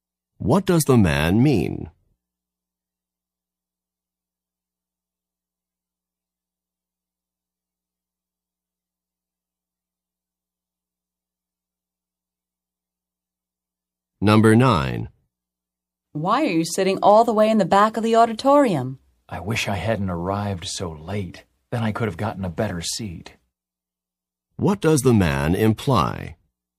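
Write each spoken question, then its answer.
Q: What does the man imply?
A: He arrived late, so he couldn't get a better seat.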